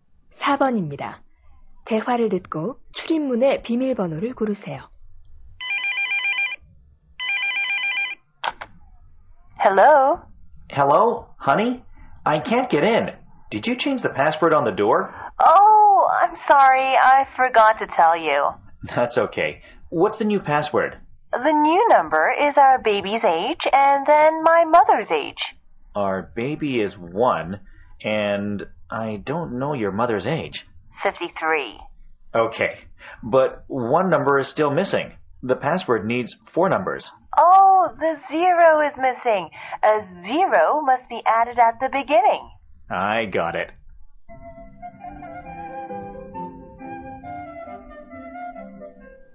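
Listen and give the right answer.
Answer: 0153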